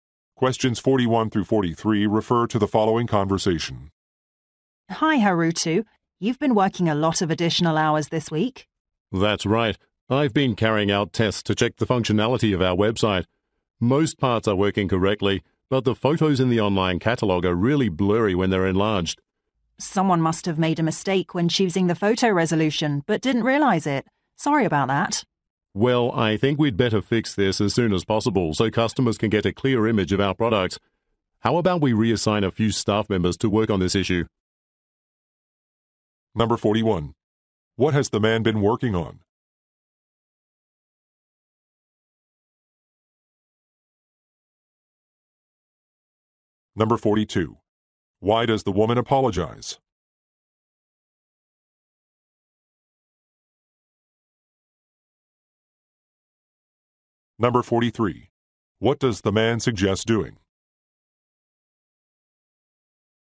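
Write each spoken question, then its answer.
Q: What has the man been working on?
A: Testing the website's functionality

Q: What does the man suggest doing?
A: Reassigning some staff to fix the issue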